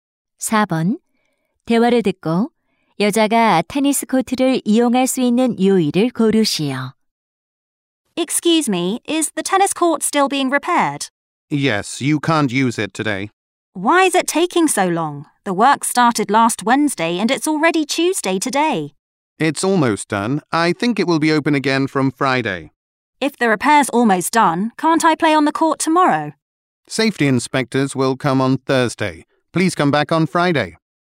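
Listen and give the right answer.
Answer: 금요일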